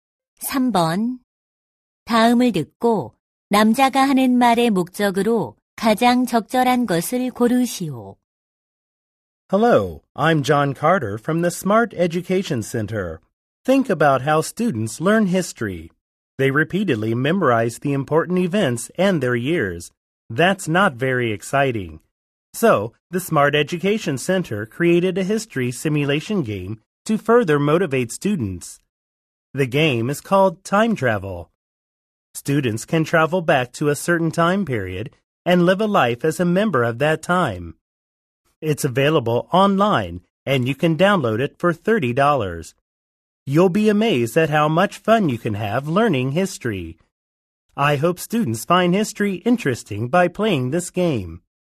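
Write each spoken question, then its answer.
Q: 다음을 듣고 남자가 하는 말의 목적으로 가장 적절한 것을 고르시오.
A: 역사 학습용 시뮬레이션 게임 'Time Travel'을 홍보하려고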